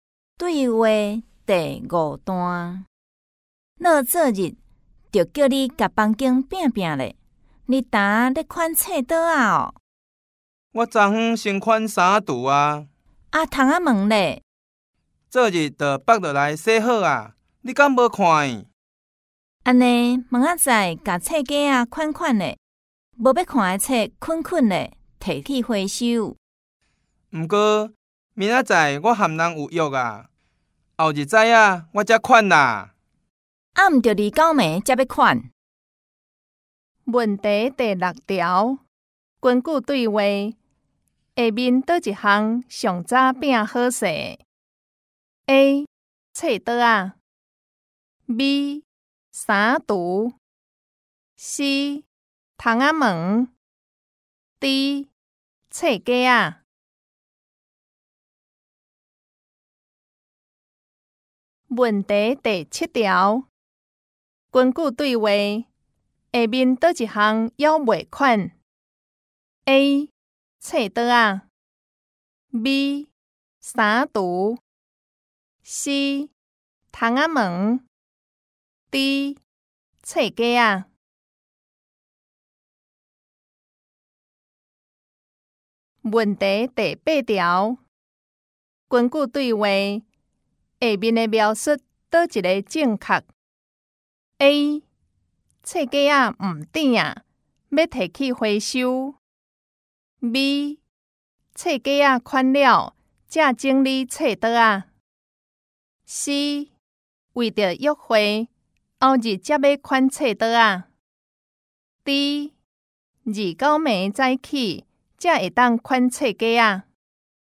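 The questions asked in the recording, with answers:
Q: 根据对话,下面倒一项上早拼好势 ?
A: B: 衫橱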